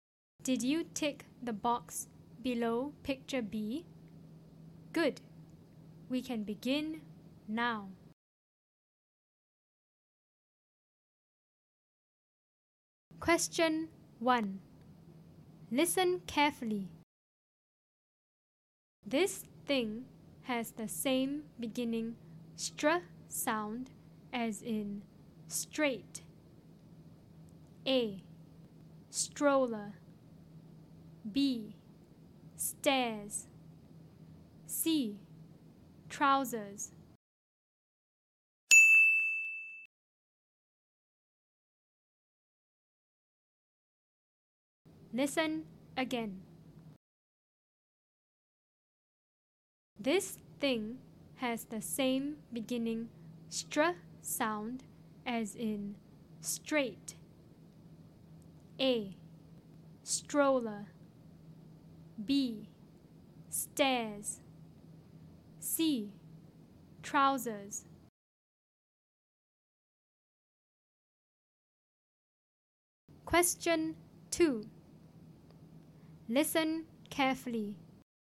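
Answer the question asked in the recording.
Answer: A: stroller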